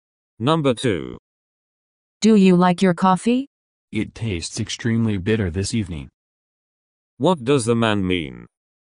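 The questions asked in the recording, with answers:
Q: What does the man mean?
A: The coffee is too bitter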